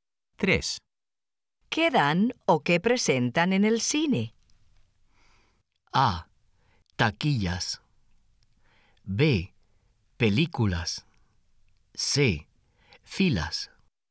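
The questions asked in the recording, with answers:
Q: ¿Qué dan o qué presentan en el cine?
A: B: Películas.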